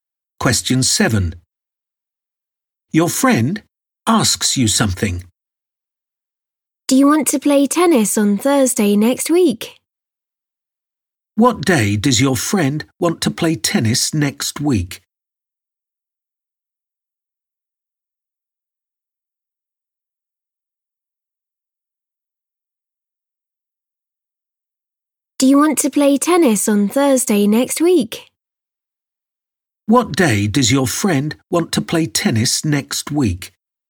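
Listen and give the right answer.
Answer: Thursday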